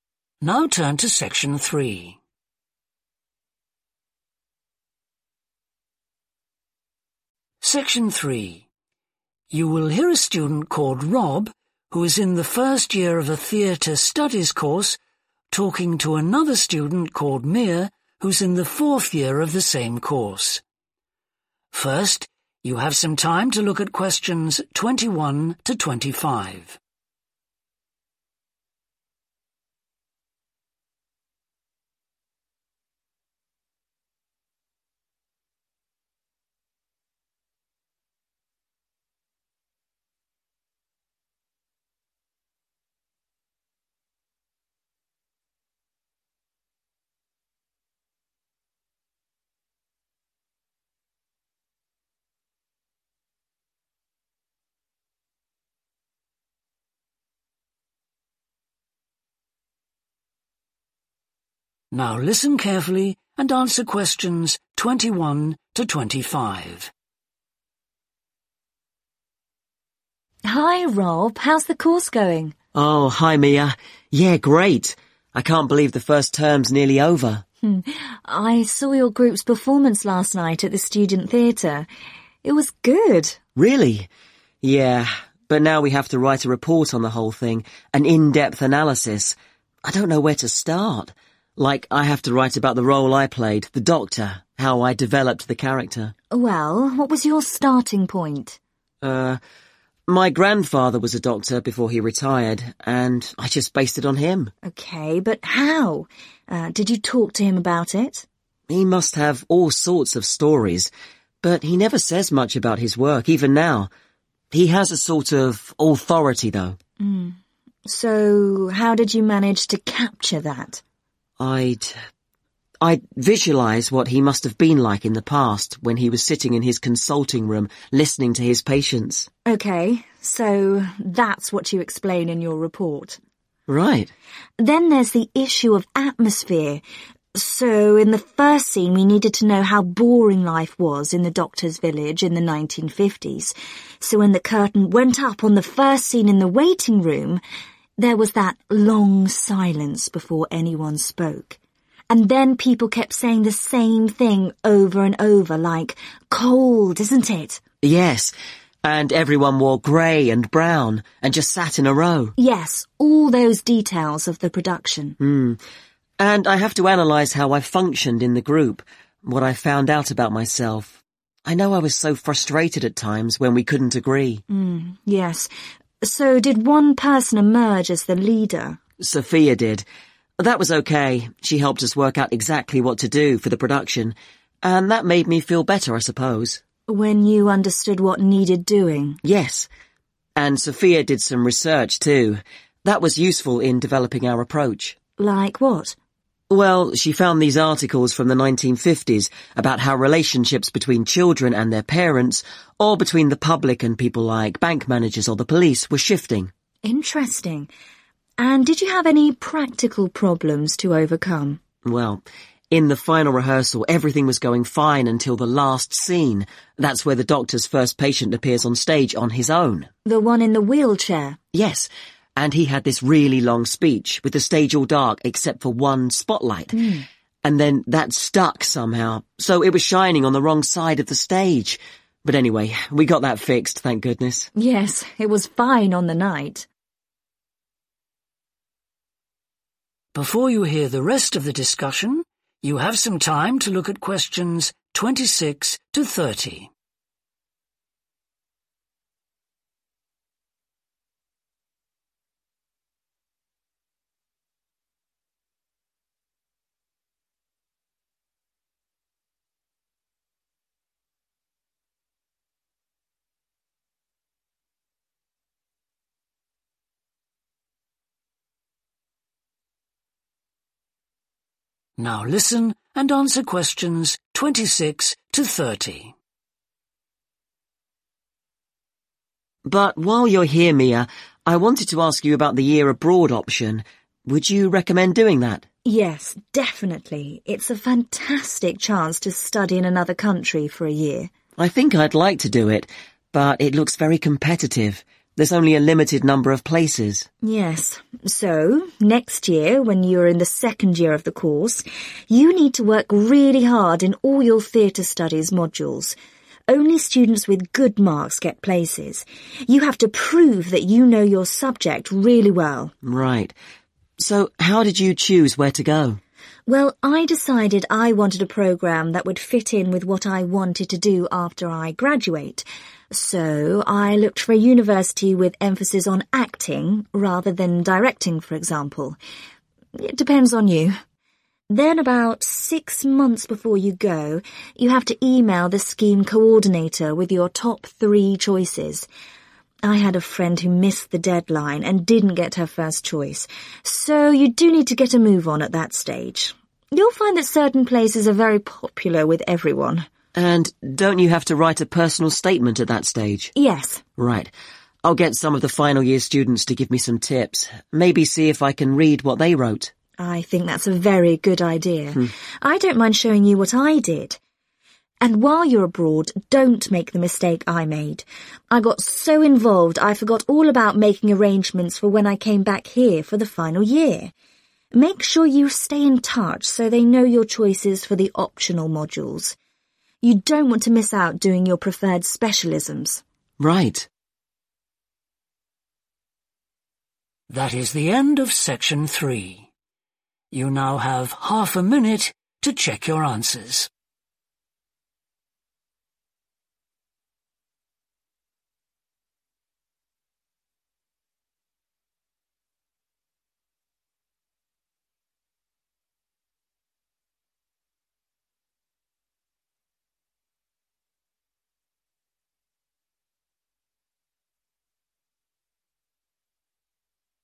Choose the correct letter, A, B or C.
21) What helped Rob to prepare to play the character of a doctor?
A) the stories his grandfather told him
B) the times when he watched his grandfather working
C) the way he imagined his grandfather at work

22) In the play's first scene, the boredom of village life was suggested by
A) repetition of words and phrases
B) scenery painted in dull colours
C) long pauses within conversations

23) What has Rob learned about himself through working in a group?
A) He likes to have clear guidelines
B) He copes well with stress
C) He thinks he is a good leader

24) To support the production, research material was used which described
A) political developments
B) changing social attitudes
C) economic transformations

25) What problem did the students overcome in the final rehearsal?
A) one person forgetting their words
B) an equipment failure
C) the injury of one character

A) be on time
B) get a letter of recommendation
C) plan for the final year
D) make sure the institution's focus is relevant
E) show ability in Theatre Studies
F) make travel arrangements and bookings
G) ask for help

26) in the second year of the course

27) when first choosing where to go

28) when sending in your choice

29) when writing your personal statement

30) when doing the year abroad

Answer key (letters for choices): 21C, 22A, 23A, 24B, 25B, 26E, 27D, 28A, 29G, 30C